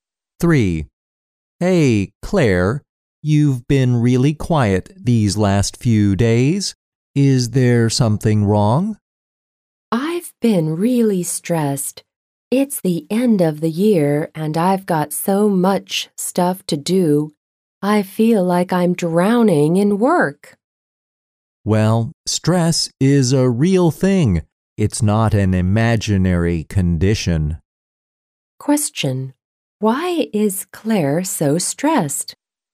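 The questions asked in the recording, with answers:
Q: Why is Claire so stressed?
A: She has too much work to do at the end of the year.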